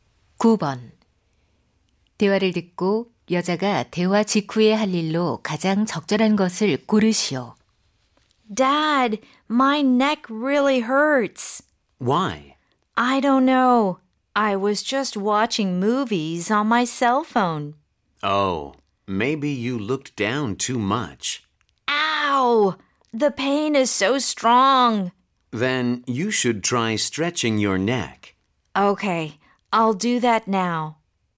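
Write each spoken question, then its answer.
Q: 대화를 듣고 여자가 대화 직후에 할 일로 가장 적절한 것을 고르시오.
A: 목 스트레칭하기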